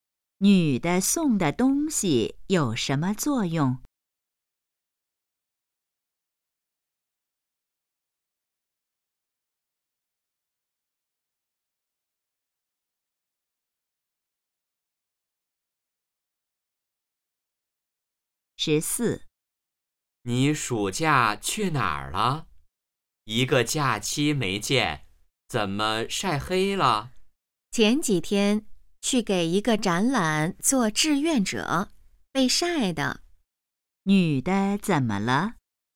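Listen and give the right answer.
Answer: 晒黑了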